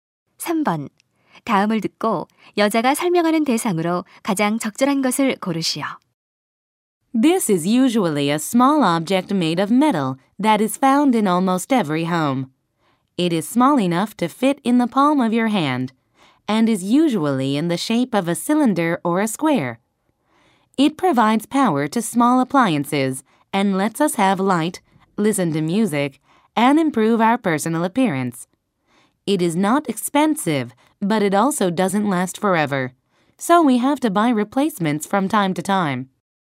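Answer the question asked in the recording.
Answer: 건전지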